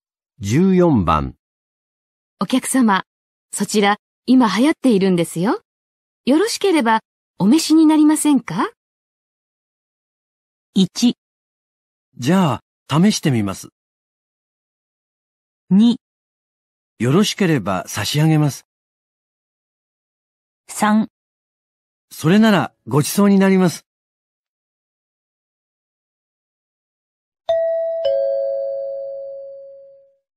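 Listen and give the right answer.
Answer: 1: じゃあ、試してみます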